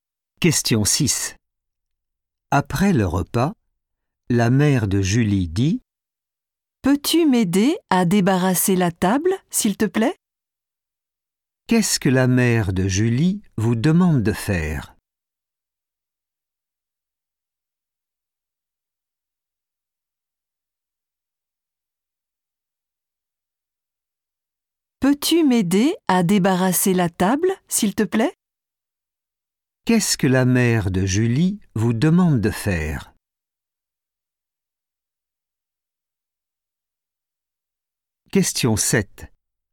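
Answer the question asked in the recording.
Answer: débarrasser la table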